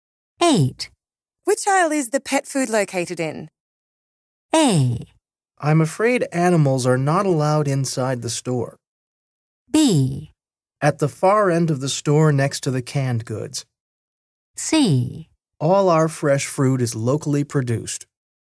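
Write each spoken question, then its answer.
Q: Which aisle is the pet food located in?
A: B: At the far end of the store next to the canned goods.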